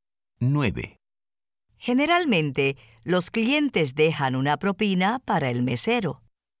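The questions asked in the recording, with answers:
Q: Generalmente, los clientes dejan una propina para el mesero.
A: Sí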